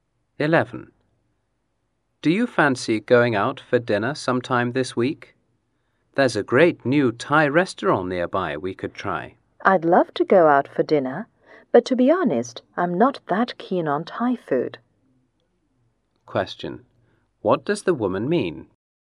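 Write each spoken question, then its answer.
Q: What does the woman mean?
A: She'd like to go out for dinner but doesn't like Thai food.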